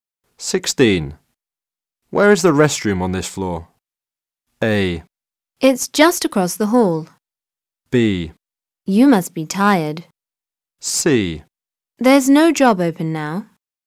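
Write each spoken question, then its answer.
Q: Where is the restroom on this floor?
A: A: It's just across the hall.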